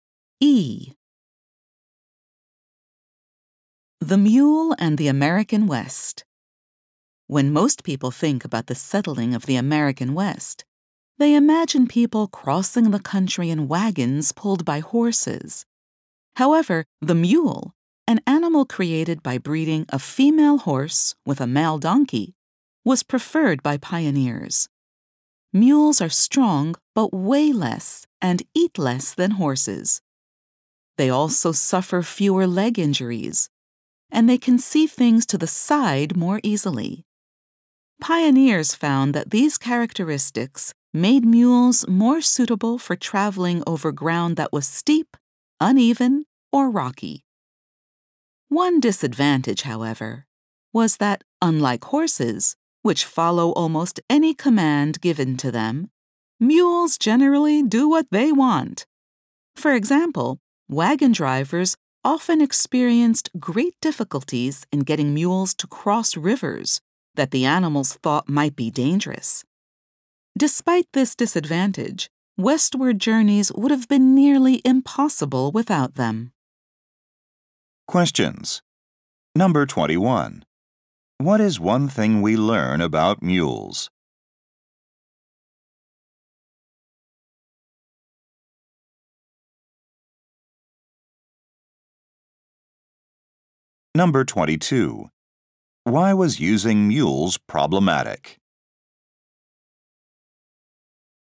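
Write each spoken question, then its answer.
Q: What is one thing we learn about mules?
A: They weigh and eat less than horses and suit steep, rocky ground

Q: Why was using mules problematic?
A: They generally do what they want, e.g. refusing to cross rivers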